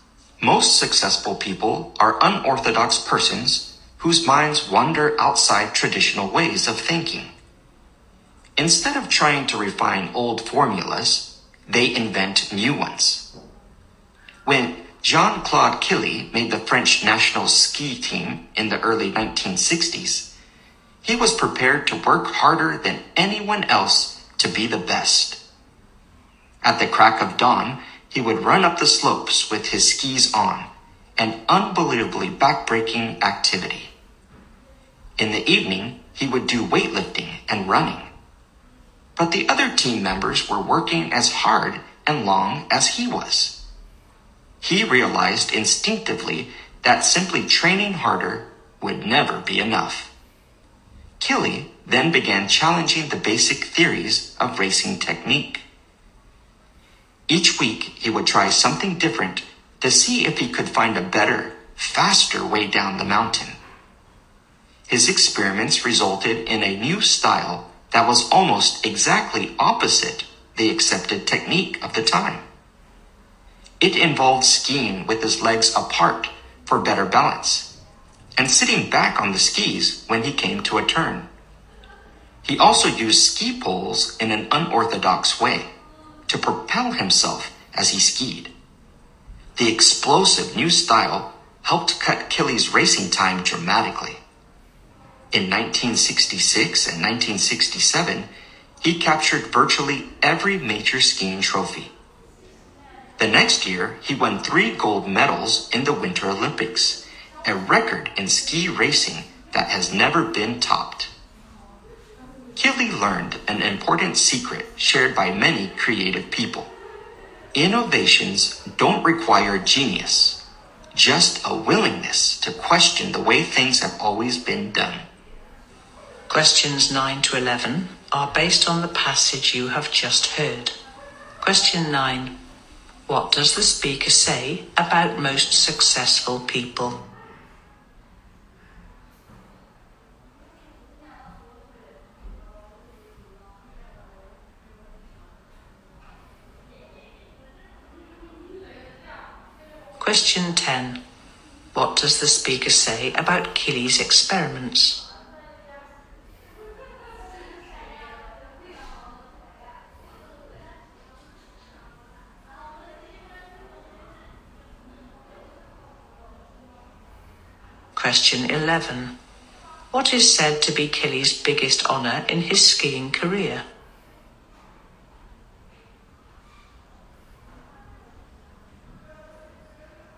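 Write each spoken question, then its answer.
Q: What does the speaker say about most successful people?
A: They think outside traditional ways and invent new formulas instead of refining old ones.

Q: What does the speaker say about Killy's experiments?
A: They resulted in a new style almost exactly opposite the accepted technique of the time.

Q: What is said to be Killy's biggest honor in his skiing career?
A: Winning 3 gold medals in the Winter Olympics, a ski racing record never topped.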